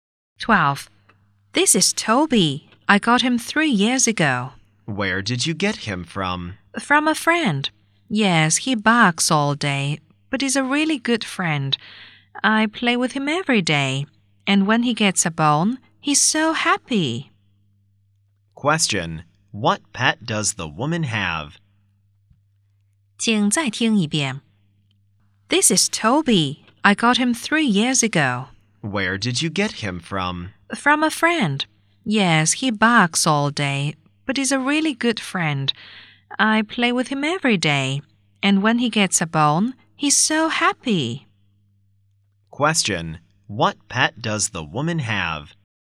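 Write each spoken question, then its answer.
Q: What pet does the woman have?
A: A dog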